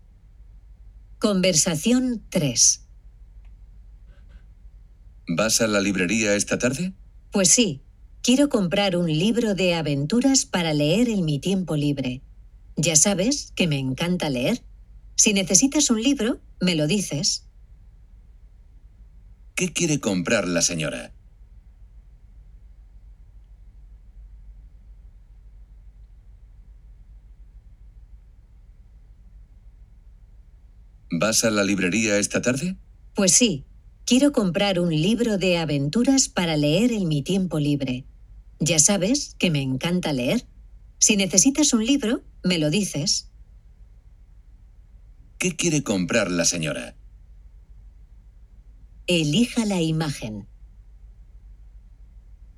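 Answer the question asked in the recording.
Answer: Un libro de aventuras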